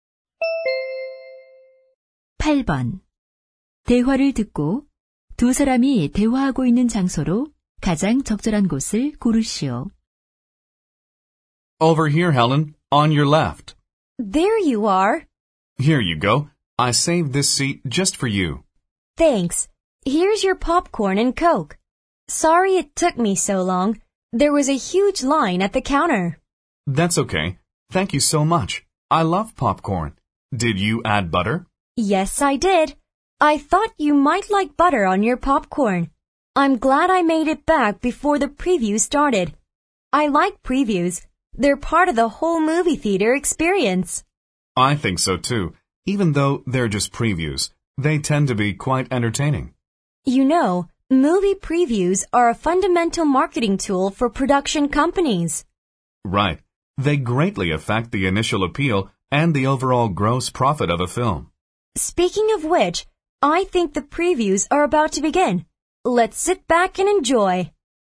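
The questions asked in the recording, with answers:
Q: 대화를 듣고 두 사람이 대화하고 있는 장소로 가장 적절한 곳을 고르시오.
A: 영화관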